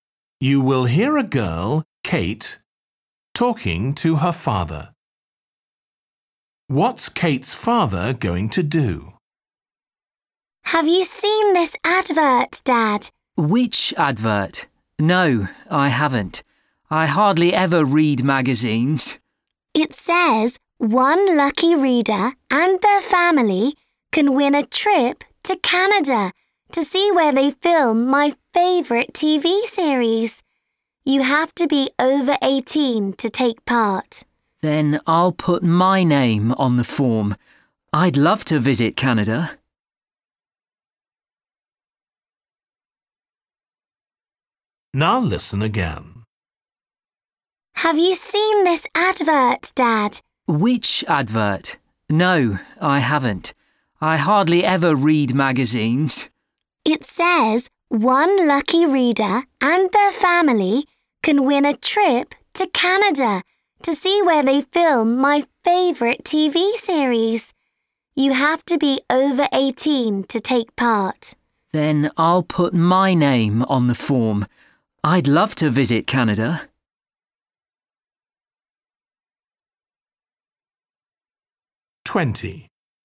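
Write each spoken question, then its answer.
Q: What's Kate's father going to do?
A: Enter a competition to win a trip to Canada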